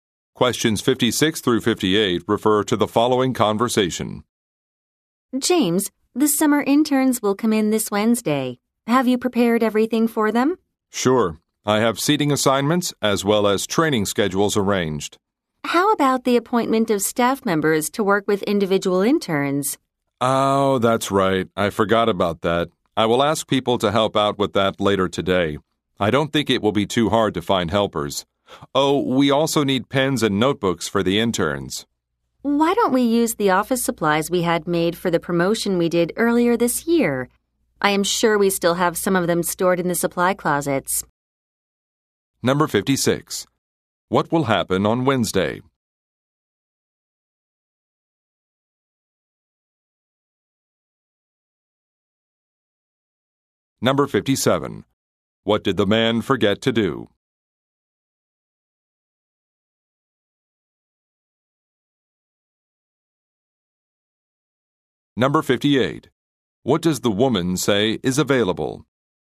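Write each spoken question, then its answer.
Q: What will happen on Wednesday?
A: The summer interns will arrive

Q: What did the man forget to do?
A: Assign staff members to work with individual interns

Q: What does the woman say is available?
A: Promotional office supplies (pens and notebooks) in the supply closets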